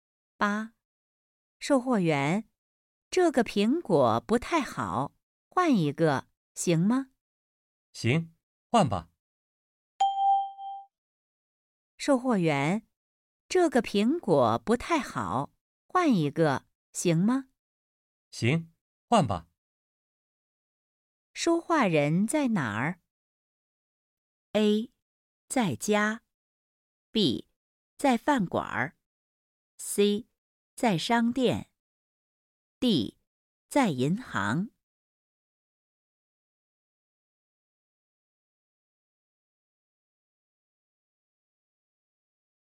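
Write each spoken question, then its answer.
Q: 说话人在哪儿?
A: C: 在商店。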